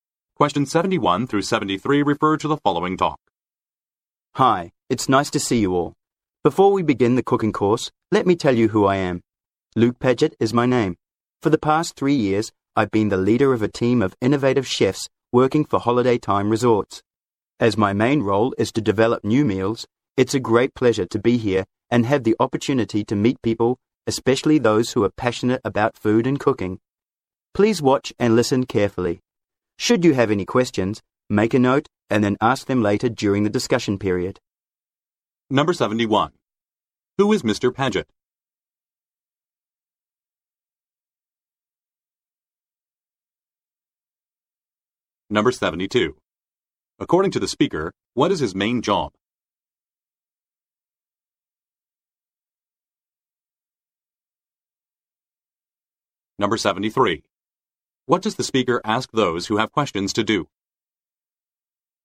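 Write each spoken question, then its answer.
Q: Who is Mr. Pedgett?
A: A chef who leads a team of chefs at Holiday Time Resorts

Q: According to the speaker, what is his main job?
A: Developing new meals

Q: What does the speaker ask those who have questions to do?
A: Make a note and ask them later during the discussion period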